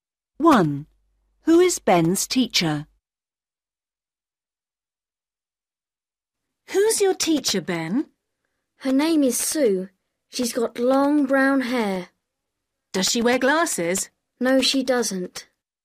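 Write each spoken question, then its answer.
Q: Who is Ben's teacher?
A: Sue, who has long brown hair and no glasses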